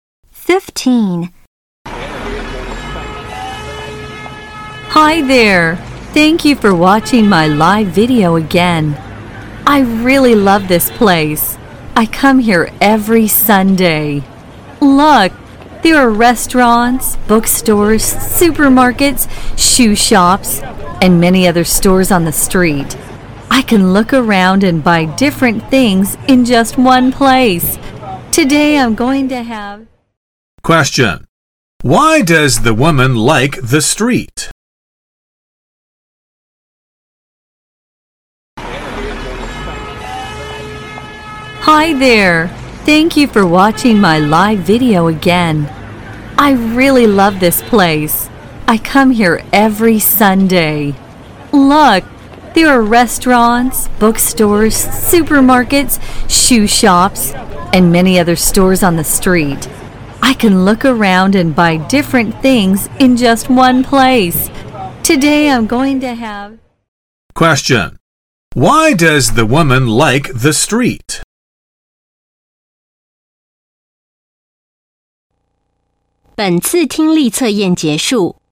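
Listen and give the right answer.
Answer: It has many different stores, so she can buy different things in one place.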